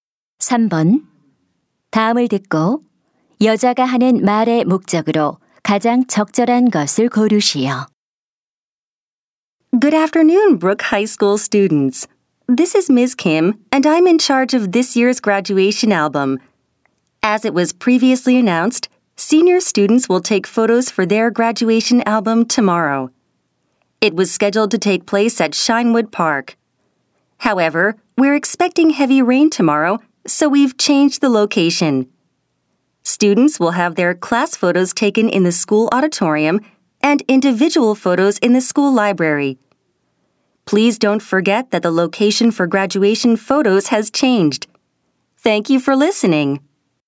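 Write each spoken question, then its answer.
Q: 다음을 듣고 여자가 하는 말의 목적으로 가장 적절한 것을 고르시오.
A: 졸업 앨범 사진 촬영 장소가 변경되었음을 알리려고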